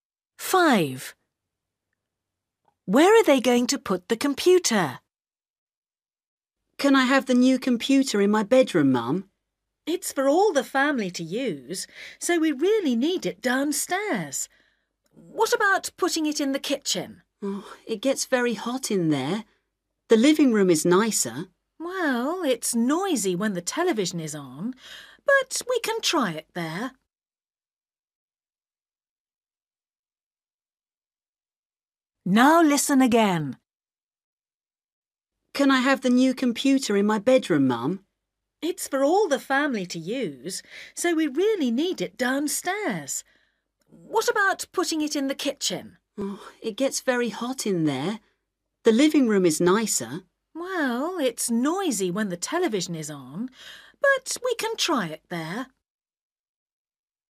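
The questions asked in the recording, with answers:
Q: Where are they going to put the computer?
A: In the living room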